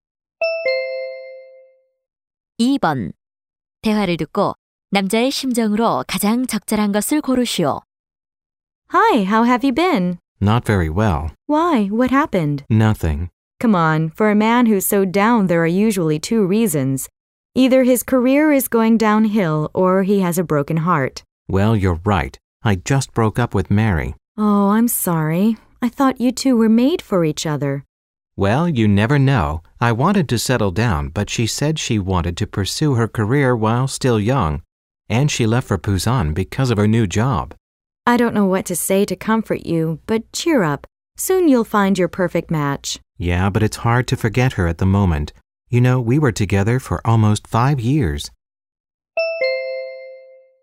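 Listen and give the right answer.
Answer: 슬프다 (실연으로 우울함)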